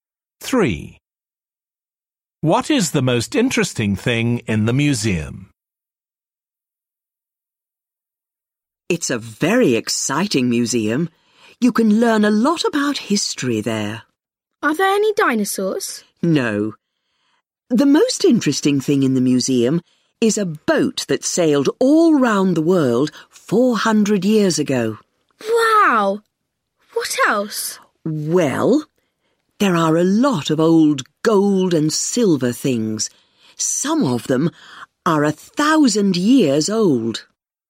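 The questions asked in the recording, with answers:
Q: What is the most interesting thing in the museum?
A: a boat that sailed round the world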